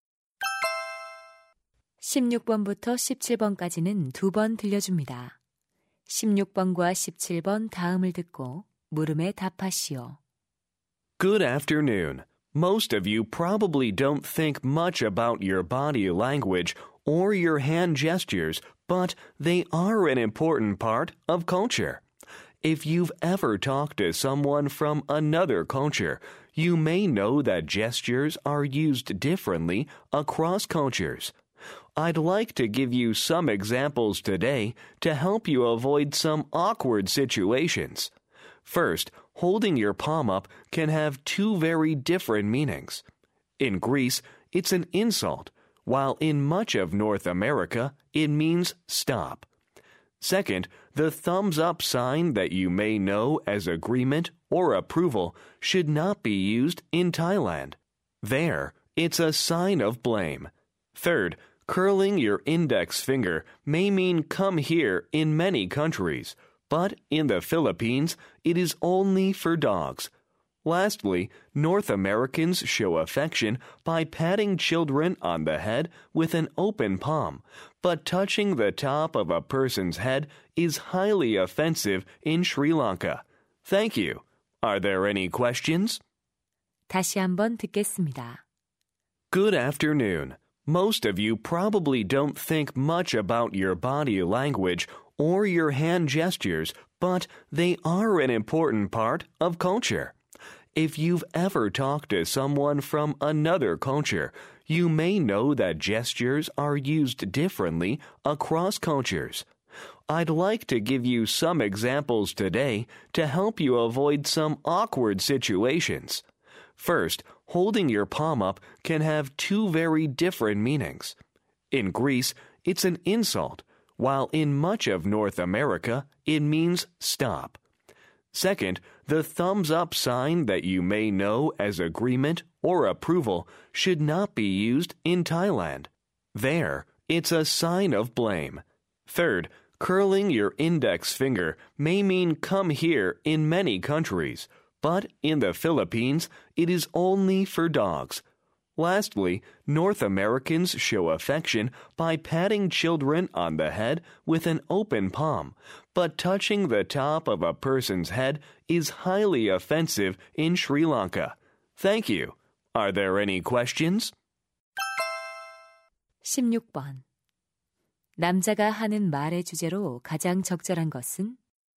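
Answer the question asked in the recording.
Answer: 문화에 따라 다른 몸짓의 의미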